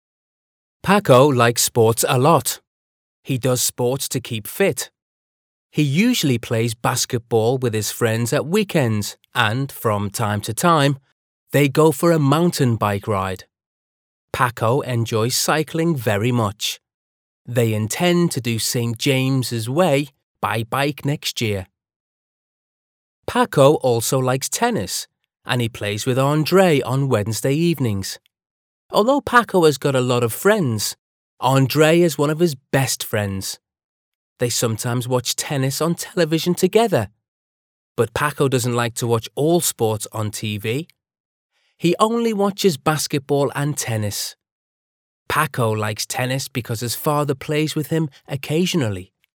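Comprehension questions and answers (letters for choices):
Choose the correct answer for each question:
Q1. Paco plays golf everyday.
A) No, he doesn't.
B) Yes, he does.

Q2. Paco likes playing tennis.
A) Yes, he does.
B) No, he doesn't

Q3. Does Paco play basketball on Wednesdays?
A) No, he doesn't.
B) Yes, he does.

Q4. Paco enjoys cycling.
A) Yes, he does.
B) No, he doesn't.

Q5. Does Paco do sports to keep fit?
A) No, he doesn't.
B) Yes, he does.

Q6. Paco and Andrés watch tennis on tv.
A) Yes, they do.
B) No, they don't.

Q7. Do Paco and his friends intend to do Saint James' Way?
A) No, they don't.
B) Yes, they do.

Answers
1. A
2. A
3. A
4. A
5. B
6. A
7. B

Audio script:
Paco likes sports a lot. He does sports to keep fit. He usually plays basketball with his friends at weekends and, from time to time, they go for a mountain bike ride. Paco enjoys cycling very much. They intend to do Saint James' Way by bike next year.
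Paco also likes tennis and he plays with Andrés on Wednesday evenings. Although Paco has got a lot of friends, Andrés is one of his best friends. They sometimes watch tennis on television together, but Paco doesn't like to watch all sports on tv. He only watches basketball and tennis. Paco likes tennis because his father plays with him occasionally.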